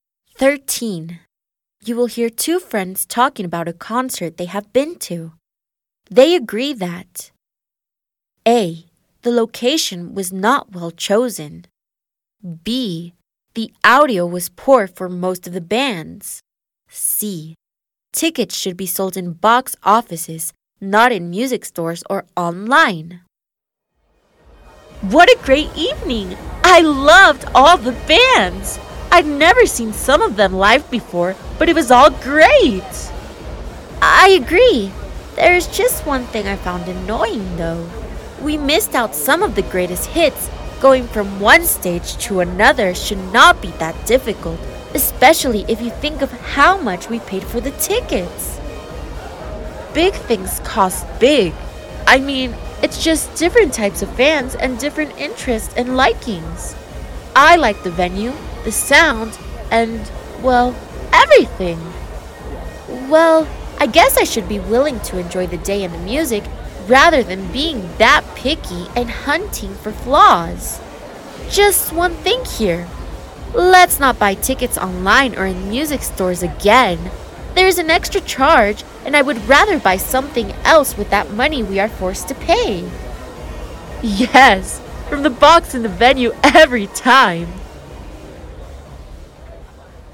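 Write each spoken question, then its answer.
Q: They agree that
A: C: Tickets should be sold in box offices, not in music stores or online.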